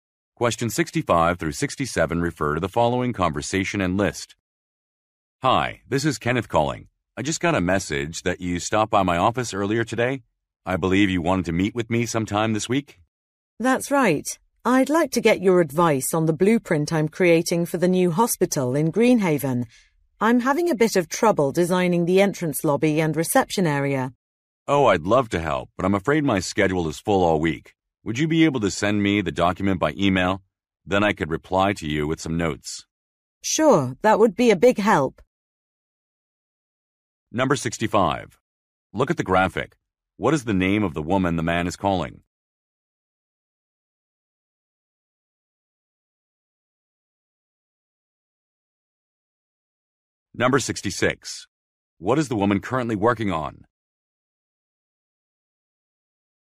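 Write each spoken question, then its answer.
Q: What is the woman currently working on?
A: A blueprint for a new hospital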